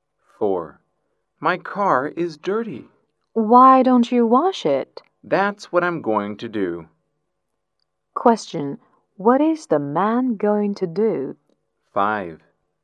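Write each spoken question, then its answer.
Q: Question. What is the man going to do?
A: Wash his car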